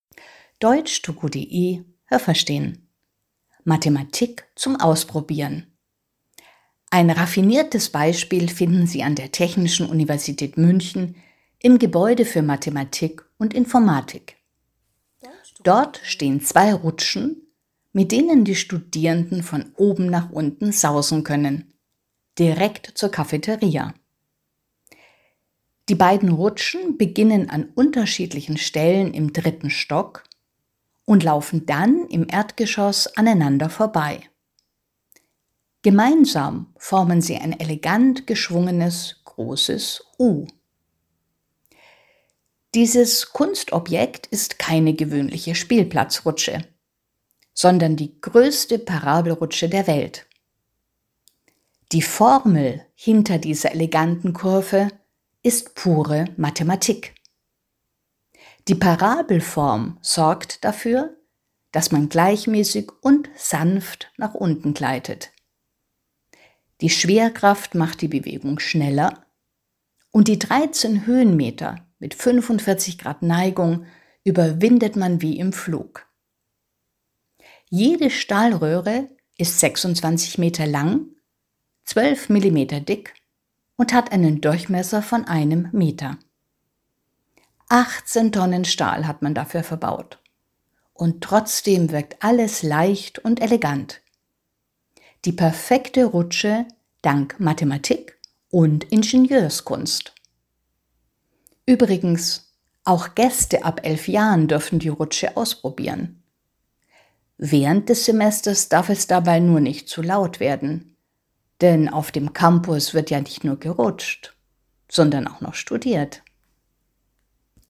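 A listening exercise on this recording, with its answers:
Haben Sie das gehört? Stimmt diese Aussage?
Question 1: An der Technischen Universität Münster kann man Mathematik ausprobieren.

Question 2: Dort gibt es zwei Rutschen, mit denen Studierende vom dritten Stock nach unten sausen können.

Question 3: Die beiden Rutschen verlaufen absolut parallel und formen ein elegantes großes U.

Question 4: Diese größte Parabelrutsche der Welt ist ein Kunstobjekt.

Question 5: Ihre elegante Form verdankt die Parabelrutsche einer exakten mathematischen Berechnung.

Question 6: Die Parabelform bewirkt, dass man gleichmäßig, aber gelegentlich ruckartig nach unten rutscht.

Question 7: Die Parabelrutsche führt über 30 Höhenmeter nach unten, jede Stahlröhre ist 26 Meter lang und es wurden 18 Tonnen Stahl verbaut.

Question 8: Jedes Jahr dürfen auch 11 Gäste die Rutsche ausprobieren.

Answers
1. Nein, das habe ich nicht gehört.
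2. Ja, das habe ich gehört.
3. Nein, das habe ich nicht gehört.
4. Ja, das habe ich gehört.
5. Ja, das habe ich gehört.
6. Nein, das habe ich nicht gehört.
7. Nein, das habe ich nicht gehört.
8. Nein, das habe ich nicht gehört.

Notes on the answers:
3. Die beiden Rutschen formen zusammen ein elegant geschwungenes großes U. Das stimmt. Aber sie verlaufen nicht parallel, sondern jede Rutsche beginnt im dritten Stock an einer anderen Stelle.
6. Man rutscht gleichmäßig und sanft nach unten, nicht ruckartig.
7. Es sind 13 Höhenmeter; die beiden anderen Zahlen sind korrekt.
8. Gäste ab 11 Jahren dürfen die Rutsche ausprobieren.

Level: B2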